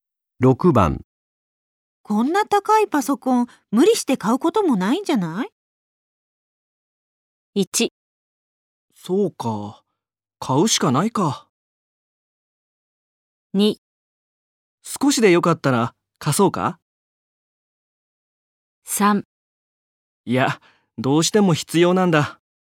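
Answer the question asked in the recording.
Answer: 3: いや、どうしても必要なんだ。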